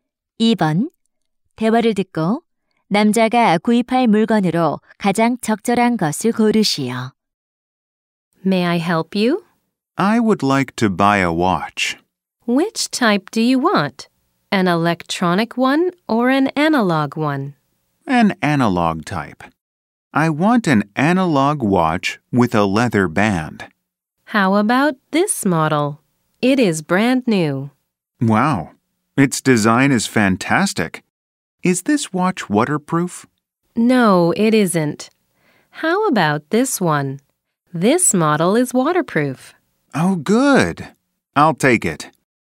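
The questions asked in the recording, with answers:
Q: 대화를 듣고 남자가 구입할 물건으로 가장 적절한 것을 고르시오.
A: 방수 아날로그 손목시계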